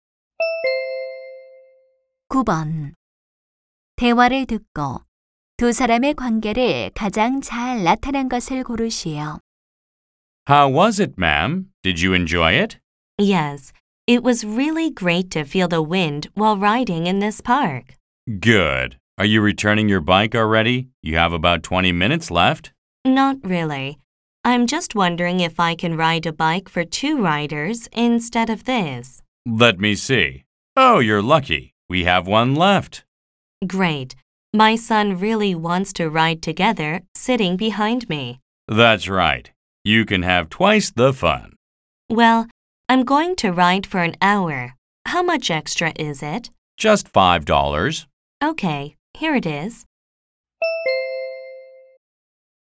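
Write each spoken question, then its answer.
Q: 대화를 듣고 두 사람의 관계를 가장 잘 나타낸 것을 고르시오.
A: 자전거 대여점 직원 - 손님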